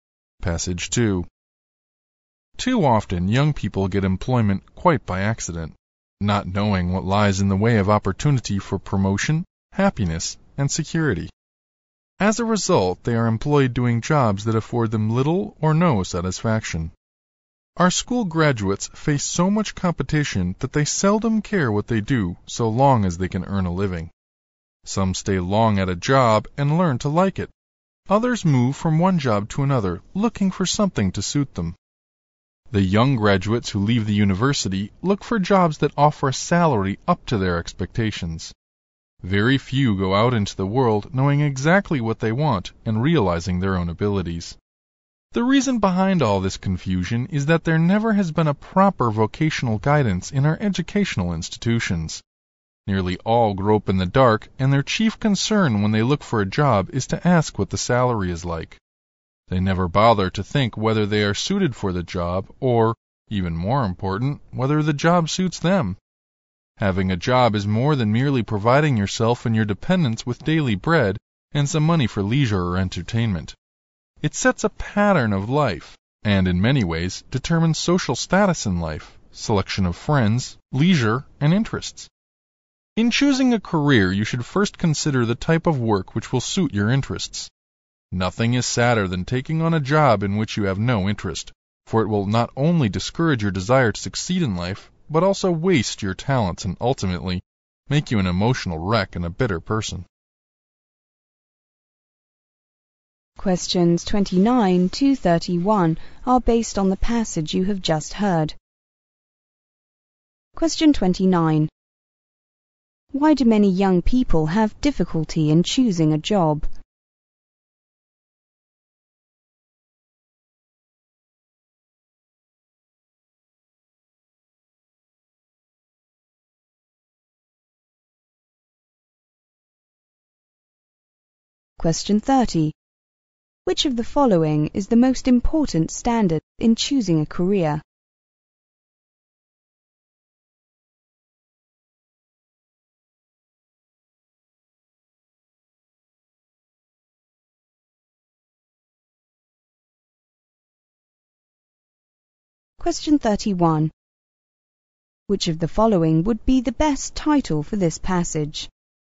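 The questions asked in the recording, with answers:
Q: Why do many young people have difficulty in choosing a job?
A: There is no proper vocational guidance in schools

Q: Which of the following is the most important standard in choosing a career?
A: Whether the work suits your interests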